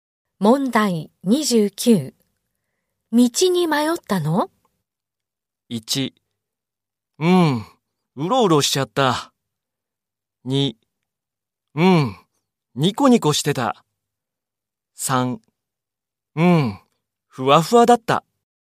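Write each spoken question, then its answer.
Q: 道に迷ったの?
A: 1: うろうろしちゃった。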